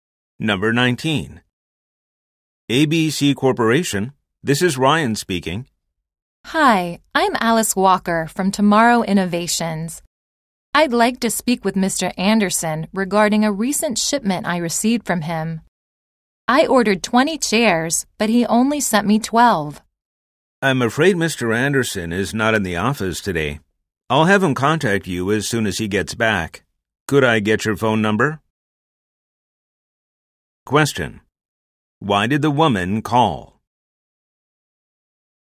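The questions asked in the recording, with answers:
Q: Why did the woman call?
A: She received only 12 of the 20 chairs she ordered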